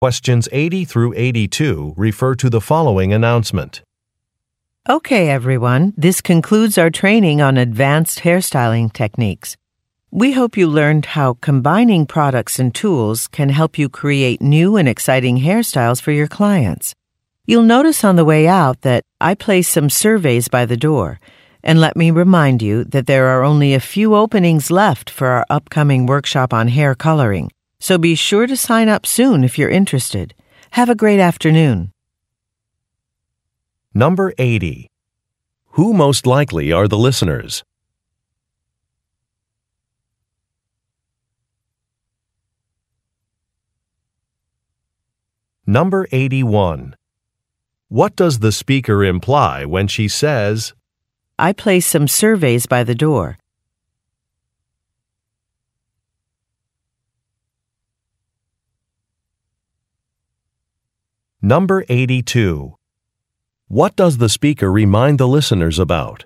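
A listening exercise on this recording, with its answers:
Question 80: Who most likely are the listeners?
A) Marketing specialists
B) Fashion models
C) Interior designers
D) Hairstylists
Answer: D) Hairstylists

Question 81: What does the speaker imply when she says, "I placed some surveys by the door"?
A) Her documents are missing.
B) She hopes to receive feedback.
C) Participants should depart promptly.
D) A task has already been completed.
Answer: B) She hopes to receive feedback.

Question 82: What does the speaker remind the listeners about?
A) Contacting clients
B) Signing up for a workshop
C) Submitting a personal profile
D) Taking a brochure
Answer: B) Signing up for a workshop

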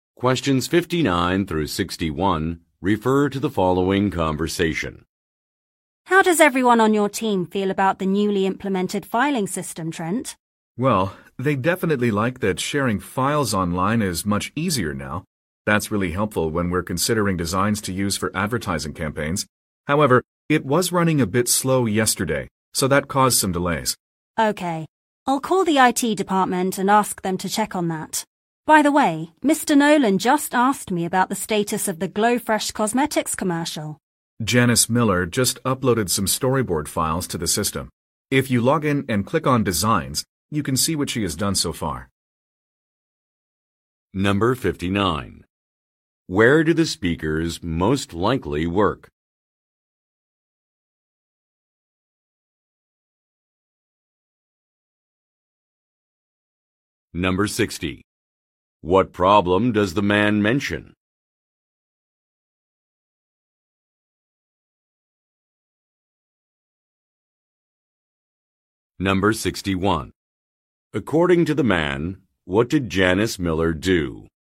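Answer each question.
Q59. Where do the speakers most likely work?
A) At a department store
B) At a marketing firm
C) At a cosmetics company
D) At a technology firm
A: B) At a marketing firm

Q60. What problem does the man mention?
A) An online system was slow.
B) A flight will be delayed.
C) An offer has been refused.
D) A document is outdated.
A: A) An online system was slow.

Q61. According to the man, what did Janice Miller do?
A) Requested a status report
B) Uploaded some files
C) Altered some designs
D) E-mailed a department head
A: B) Uploaded some files

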